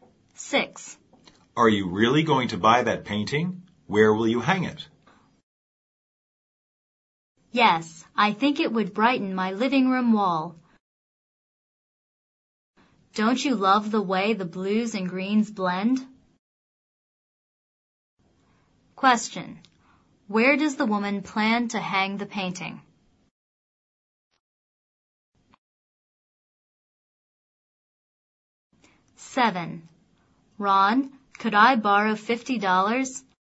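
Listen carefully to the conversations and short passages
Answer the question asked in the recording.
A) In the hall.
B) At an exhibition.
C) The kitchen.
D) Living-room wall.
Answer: D) Living-room wall.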